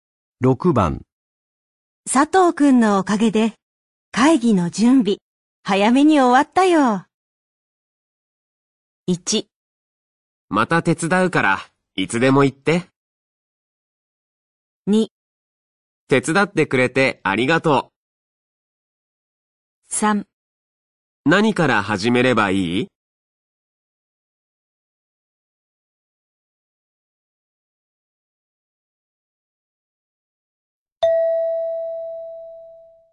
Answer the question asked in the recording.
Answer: 1

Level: N3 Listening · Test 9